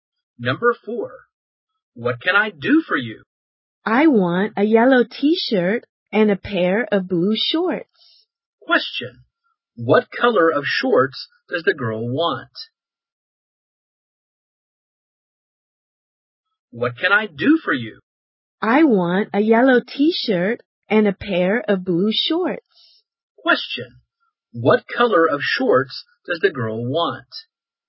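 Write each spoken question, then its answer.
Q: what color of shorts does the girl want?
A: Blue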